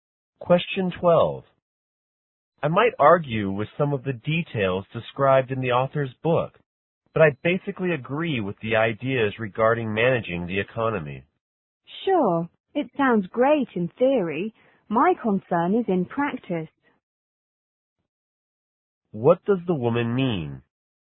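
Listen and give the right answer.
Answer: The ideas sound good in theory but may not work in practice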